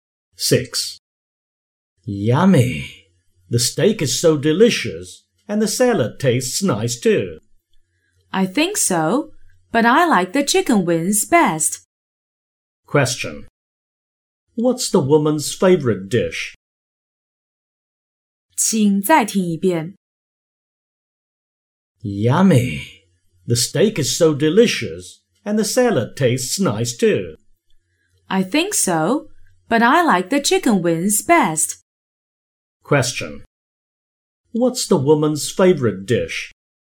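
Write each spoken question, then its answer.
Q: What's the woman's favorite dish?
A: Chicken wings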